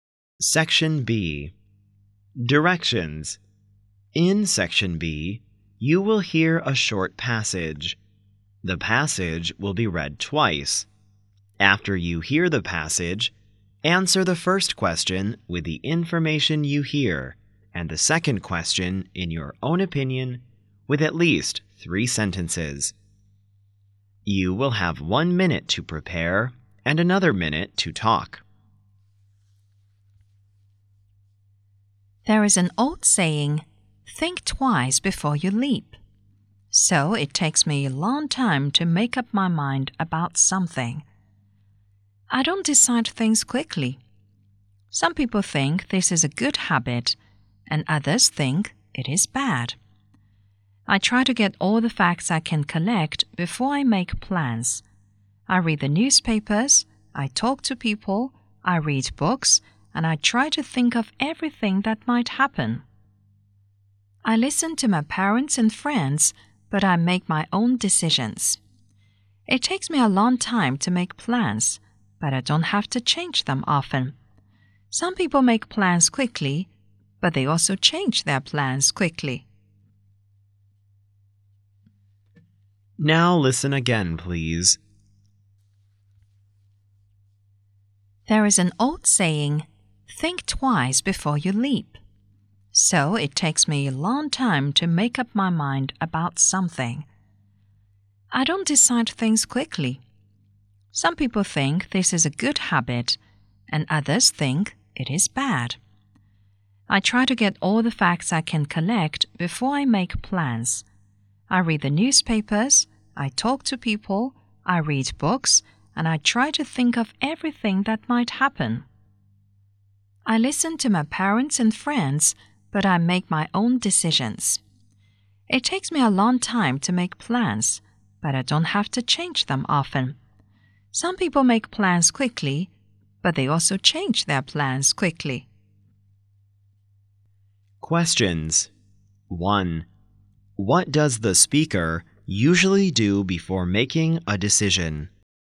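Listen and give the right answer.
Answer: Gets all the facts: reads newspapers and books, talks to people, and thinks of everything that might happen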